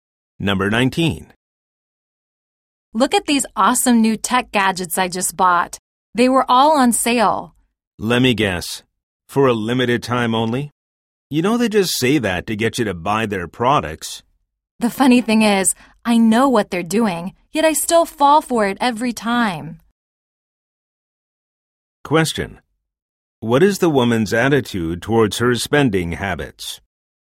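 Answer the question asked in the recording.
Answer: She knows sales tactics trick her but still falls for them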